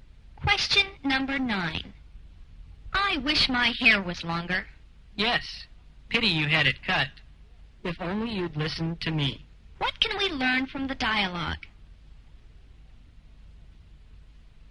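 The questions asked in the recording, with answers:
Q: What can we learn from the dialogue?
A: The speaker regrets having her hair cut short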